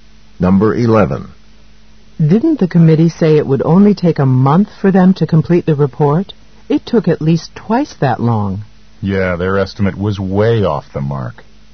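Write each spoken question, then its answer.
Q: What does the man mean?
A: The committee's estimate was far off.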